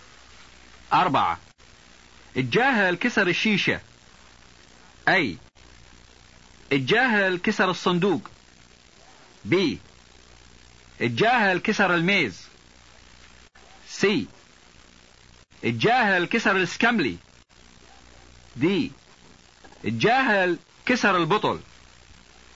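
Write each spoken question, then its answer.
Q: اربعة الجاهل كسر الشيشة.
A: D: الجاهل كسر البطل.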